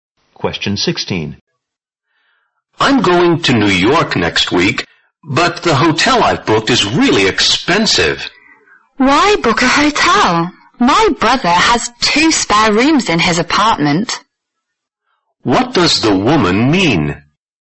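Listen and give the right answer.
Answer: The man can stay at her brother's apartment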